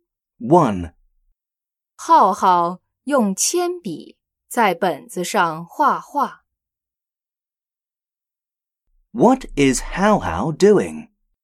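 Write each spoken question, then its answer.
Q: What is Hao Hao doing?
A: Drawing in a notebook with a pencil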